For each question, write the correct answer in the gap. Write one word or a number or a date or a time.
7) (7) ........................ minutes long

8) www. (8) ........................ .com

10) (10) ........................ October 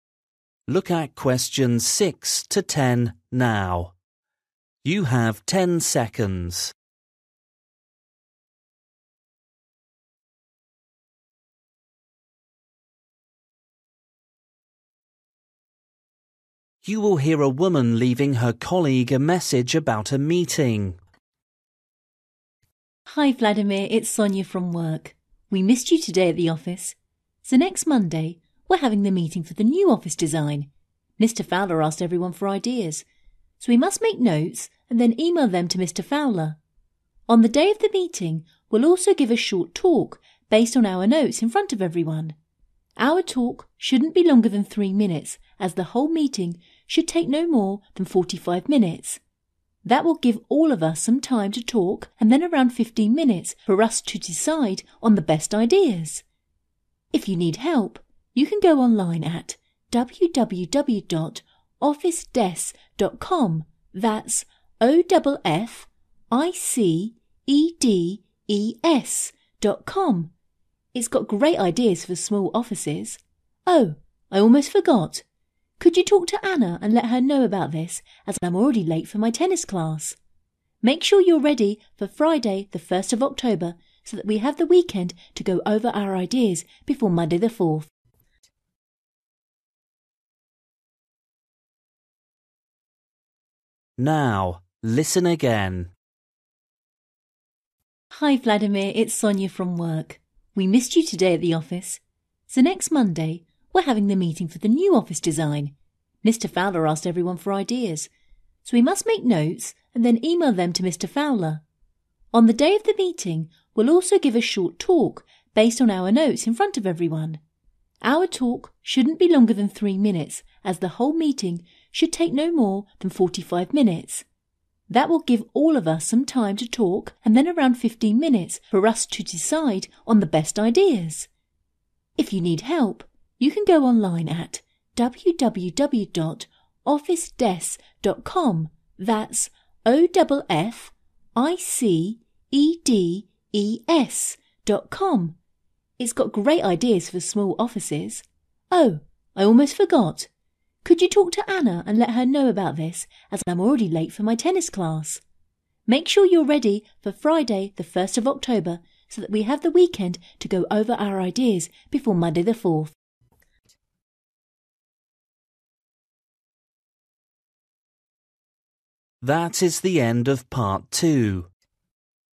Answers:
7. 45
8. officedes
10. 4th/fourth

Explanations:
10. before Monday the 4th.

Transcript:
F: Hi Vladimir, it's Sonia from work. We missed you today at the office. So next Monday we're having the meeting for the new office design. Mr Fowler asked everyone for ideas.
(6) So we must make notes and then email them to Mr Fowler. On the day of the meeting we'll also give a short talk based on our notes in front of everyone. Our talk shouldn't be longer than 3 minutes (7) as the whole meeting should take no more than 45 minutes. That will give all of us some time to talk and then around 15 minutes for us to decide on the best ideas.
(8) If you need help, you can go online at www.officedes.com. That's O-DOUBLE F-I-C-E-D-E-S.com. It's got great ideas for small offices. Oh, I almost forgot. (9) Could you talk to Anna and let her know about this as I'm already late for my tennis class.

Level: KET (A2)